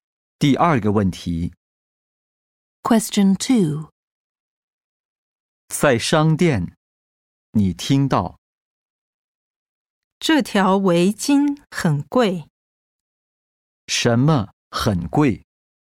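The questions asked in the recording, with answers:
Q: 什么很贵?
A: 围巾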